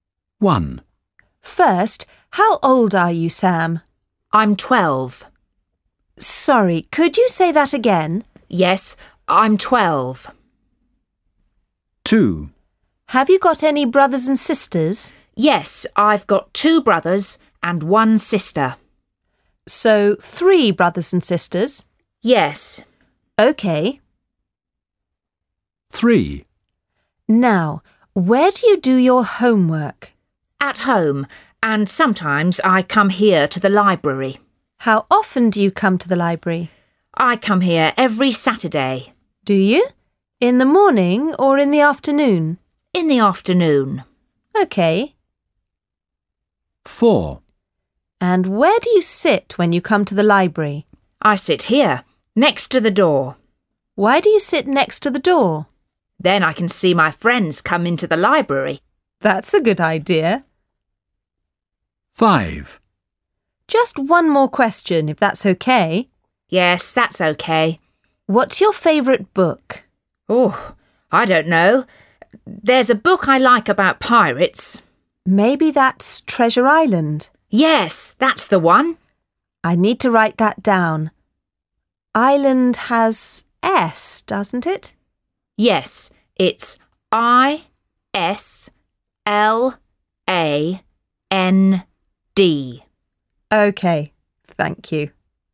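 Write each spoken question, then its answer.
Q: First, how old are you, Sam?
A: 12

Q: How often do you come to the library?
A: every Saturday

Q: And where do you sit when you come to the library?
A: next to the door

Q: What's your favourite book?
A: Treasure Island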